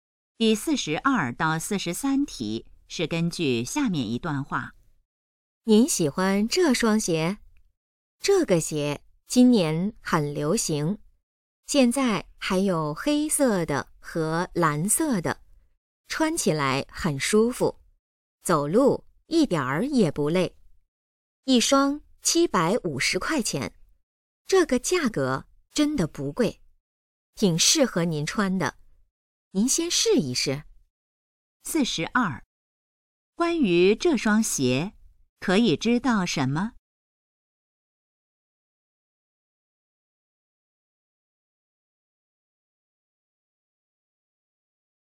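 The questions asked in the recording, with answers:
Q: 说话人最可能是做什么的?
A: 售货员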